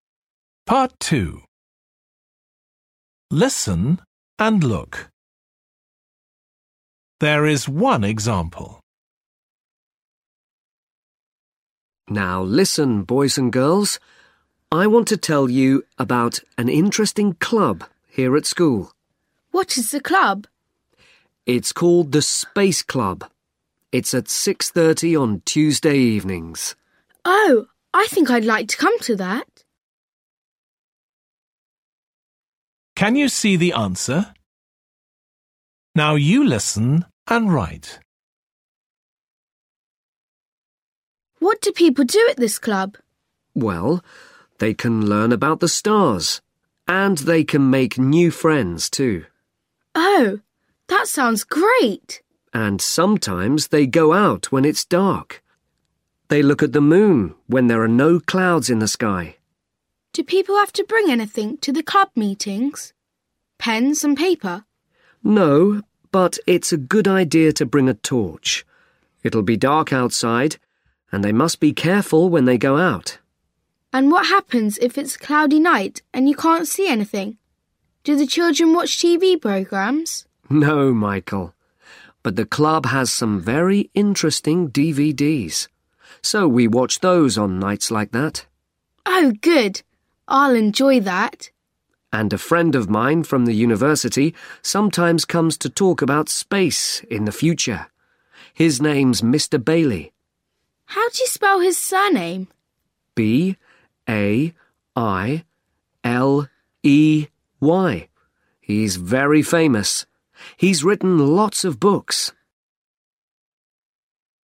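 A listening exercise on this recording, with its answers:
Listen and write.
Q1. Children learn about: the .........................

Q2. Sometimes they look at: the .........................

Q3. Children should bring: a .........................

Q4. If it's cloudy, children watch: .........................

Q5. Person who sometimes talks to club : Mr .........................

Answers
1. stars
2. moon
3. torch
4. DVDs
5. Bailey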